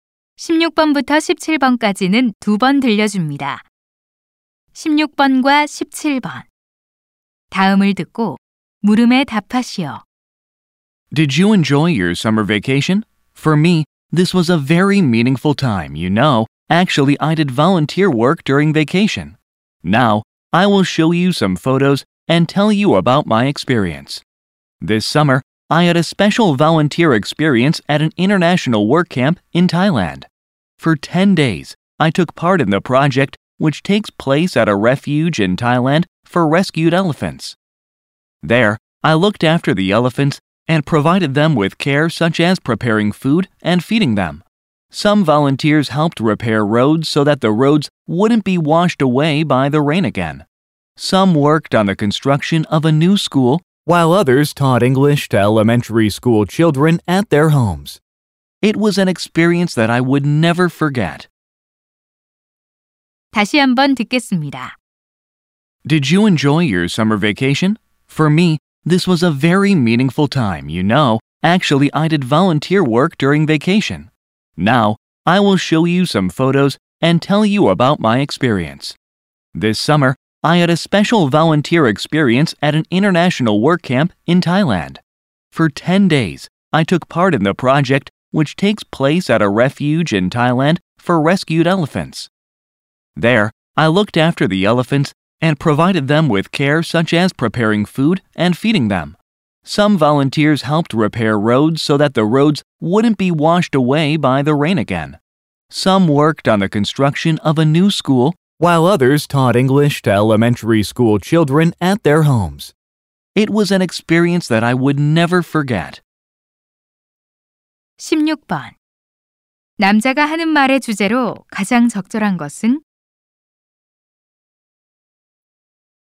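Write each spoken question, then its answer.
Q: 남자가 하는 말의 주제로 가장 적절한 것은?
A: 태국 국제 워크캠프 봉사활동 경험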